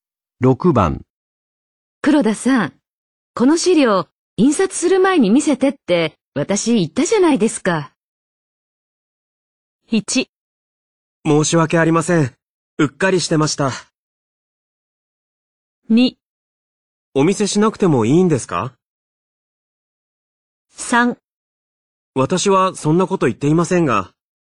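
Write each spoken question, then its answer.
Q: 黒田さん、この資料、印刷する前に見せてって、私言ったじゃないですか。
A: 1: 申し訳ありません。うっかりしてました。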